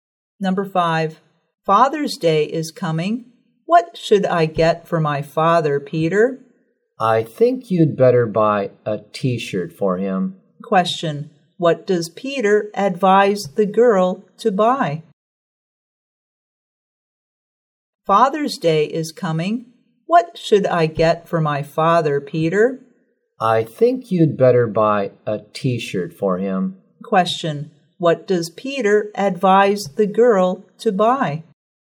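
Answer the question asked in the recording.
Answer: A T-shirt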